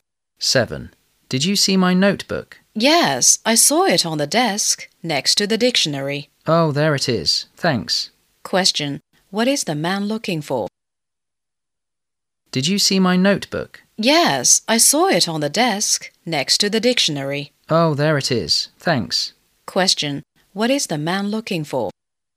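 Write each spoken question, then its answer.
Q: Question, what is the man looking for?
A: His notebook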